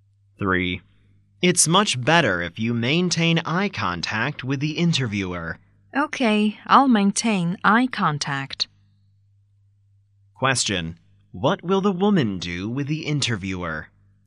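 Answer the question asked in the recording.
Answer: Maintain eye contact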